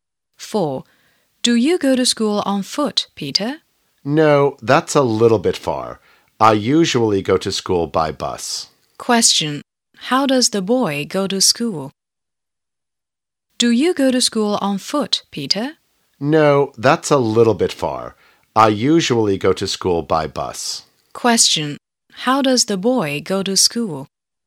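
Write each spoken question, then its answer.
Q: How does the boy go to school?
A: By bus.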